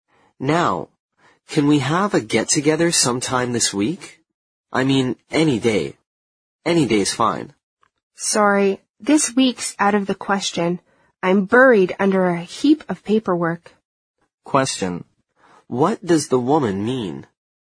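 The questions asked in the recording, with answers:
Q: What does the woman mean?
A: She is too busy with paperwork to get together this week.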